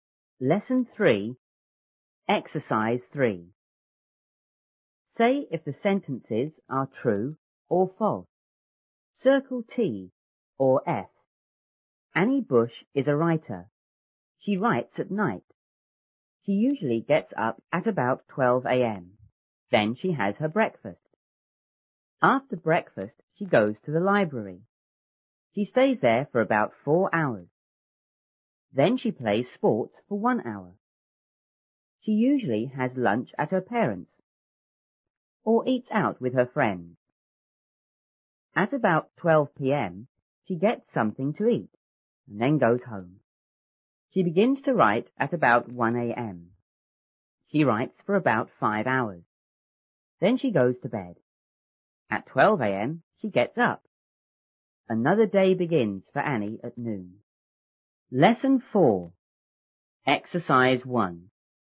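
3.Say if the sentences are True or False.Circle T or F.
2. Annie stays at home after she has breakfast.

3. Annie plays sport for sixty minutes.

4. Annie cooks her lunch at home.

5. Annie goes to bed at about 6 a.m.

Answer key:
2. F
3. T
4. F
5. T

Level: 初中英语广州版1B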